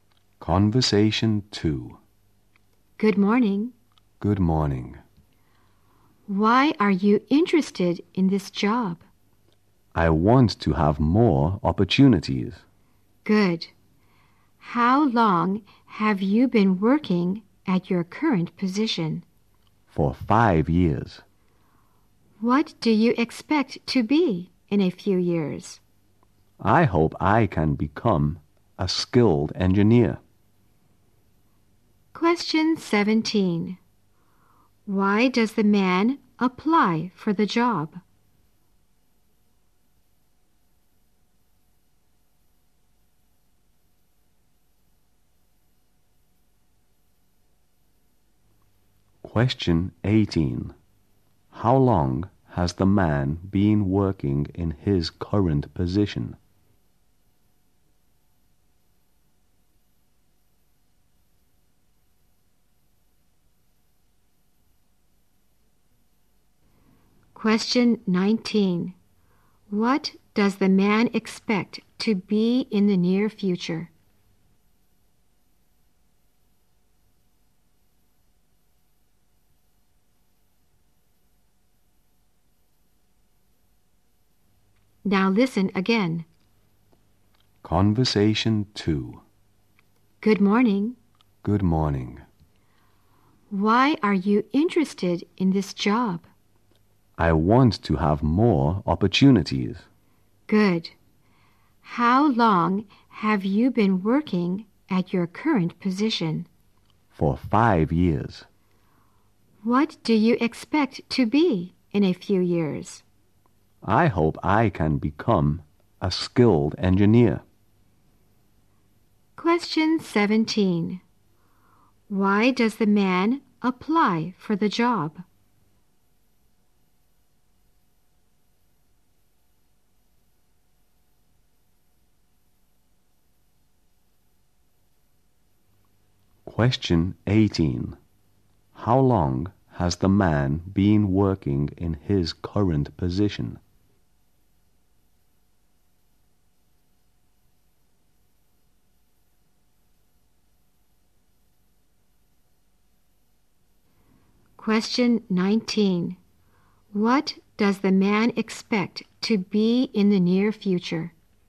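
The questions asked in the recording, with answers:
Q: Question 17. Why does the man apply for the job?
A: He wants more opportunities

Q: Question 18. How long has the man been working in his current position?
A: For 5 years

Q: Question 19. What does the man expect to be in the near future?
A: A skilled engineer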